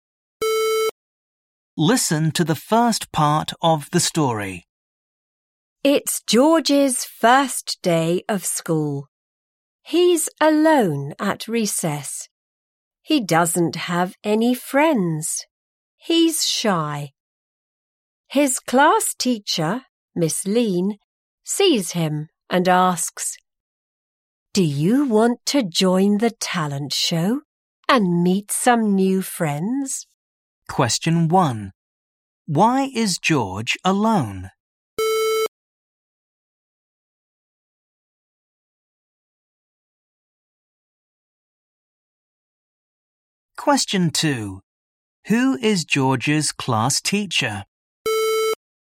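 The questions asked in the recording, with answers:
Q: Why is George alone?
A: He is shy and doesn't have any friends.

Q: Who is George's class teacher?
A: Miss Lean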